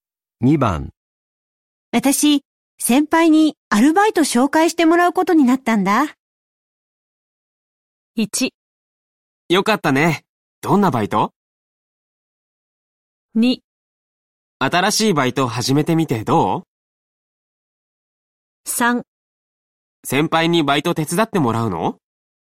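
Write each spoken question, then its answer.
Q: 私、先輩にアルバイト紹介してもらうことになったんだ。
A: 1: よかったね。どんなバイト?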